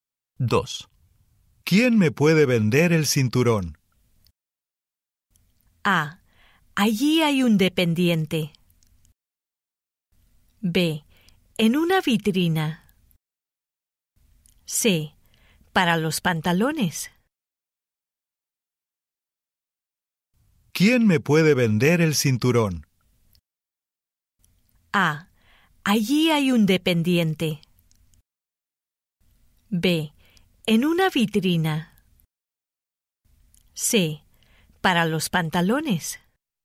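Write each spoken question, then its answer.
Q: ¿Quién me puede vender el cinturón?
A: A: Allí hay un dependiente.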